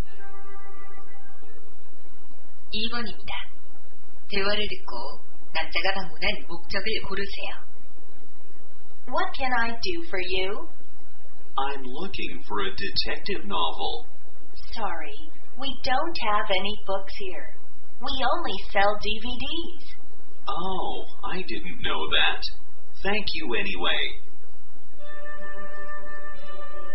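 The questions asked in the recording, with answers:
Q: 대화를 듣고 남자가 방문한 목적을 고르세요.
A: 추리 소설을 사려고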